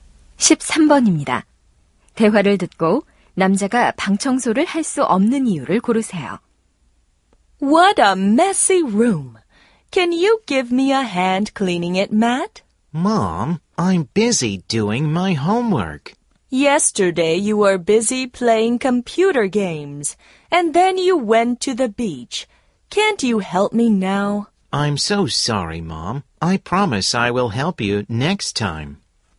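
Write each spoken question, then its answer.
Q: 대화를 듣고 남자가 방 청소를 할 수 없는 이유를 고르세요.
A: 숙제하느라 바빠서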